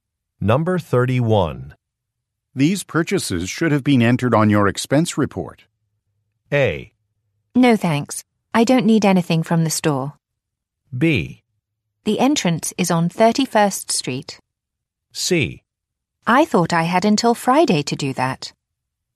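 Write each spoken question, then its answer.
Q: These purchases should have been entered on your expense report.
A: C: I thought I had until Friday to do that.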